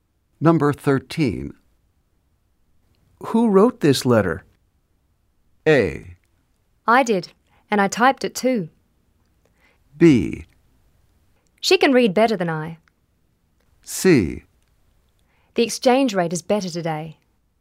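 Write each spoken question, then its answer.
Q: Who wrote this letter?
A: A: I did, and I typed it too.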